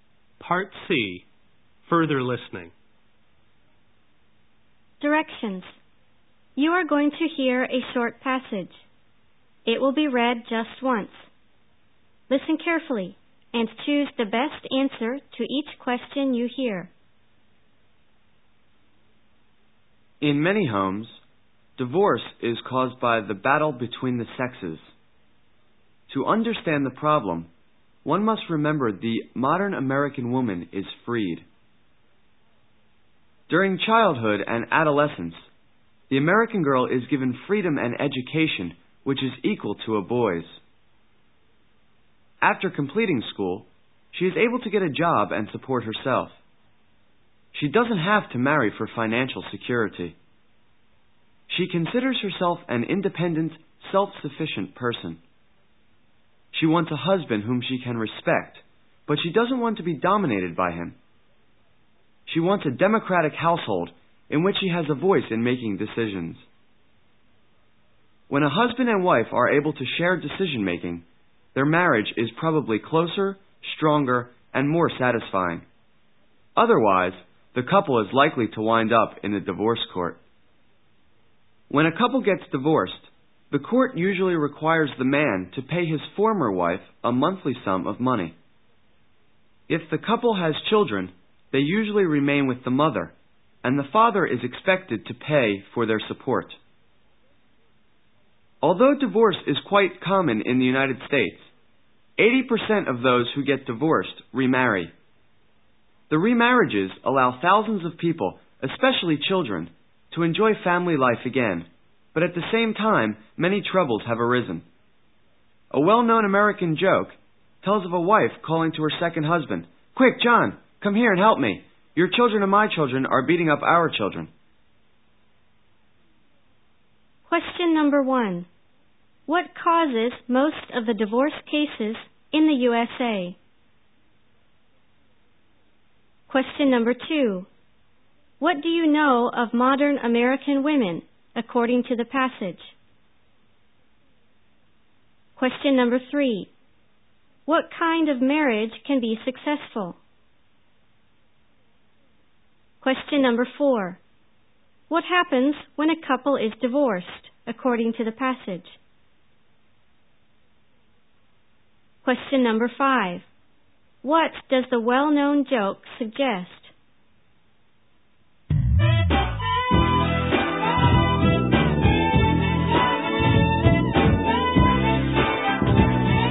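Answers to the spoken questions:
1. The battle between the sexes
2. They are independent and self-sufficient
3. One where husband and wife share decision-making
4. The man usually pays his former wife a monthly sum and supports the children, who stay with the mother
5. Remarriage brings many troubles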